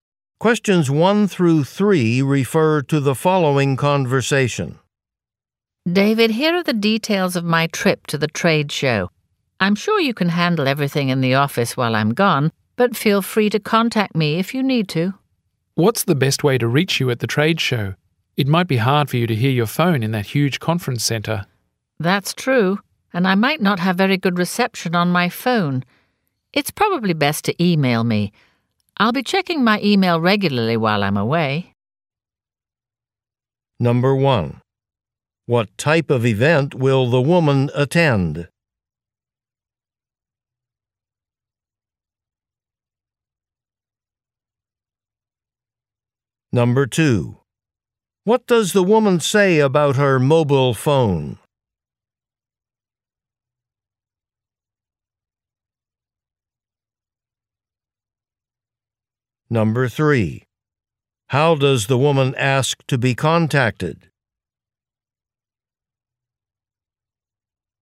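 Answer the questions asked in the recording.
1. A trade show
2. She might not have very good reception
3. By email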